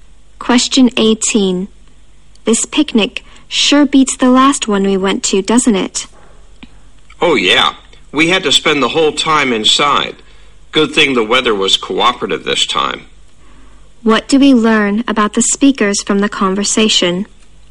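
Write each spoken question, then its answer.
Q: What do we learn about the speakers from the conversation?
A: The weather was bad at their last picnic but good this time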